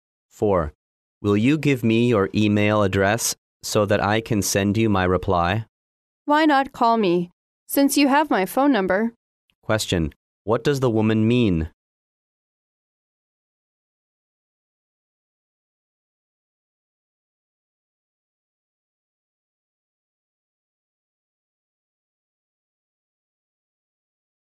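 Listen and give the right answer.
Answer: She would prefer the man to call her instead of emailing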